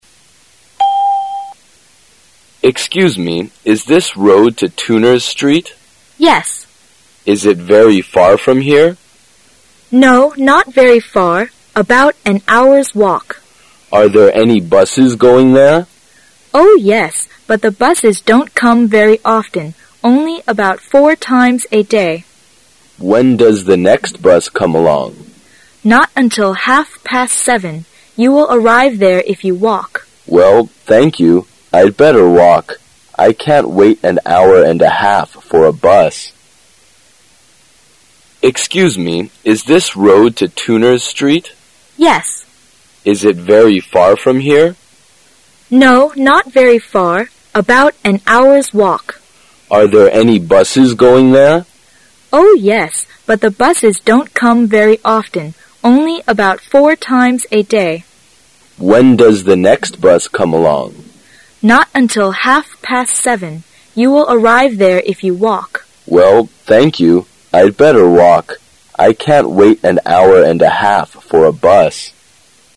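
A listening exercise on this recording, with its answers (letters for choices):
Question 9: Why did the man ask the woman the way?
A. Because he wanted to arrive at Turner's Street on time.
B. Because he didn't know where the bus stop was.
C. Because he didn't know how to get to Turner's Street.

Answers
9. C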